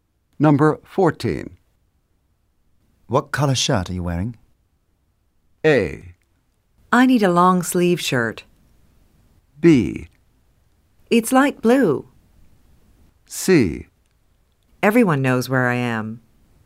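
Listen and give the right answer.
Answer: B: It's light blue.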